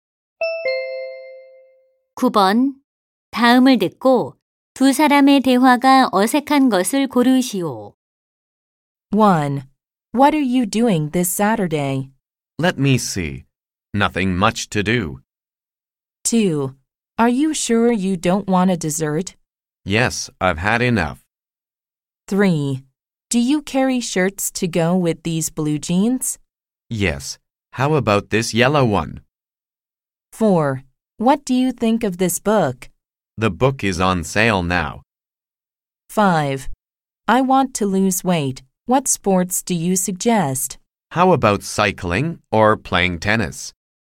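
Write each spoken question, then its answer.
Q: 다음을 듣고 두 사람의 대화가 어색한 것을 고르시오.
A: 4: What do you think of this book? / The book is on sale now.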